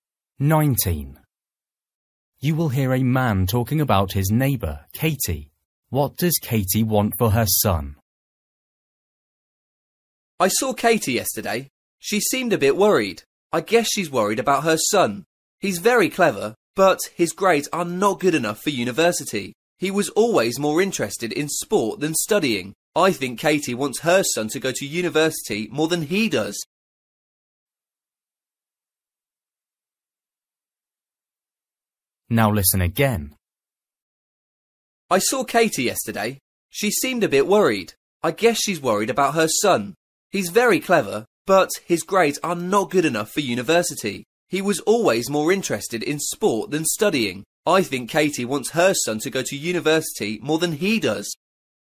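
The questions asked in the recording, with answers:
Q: What does Katie want for her son?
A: For him to go to university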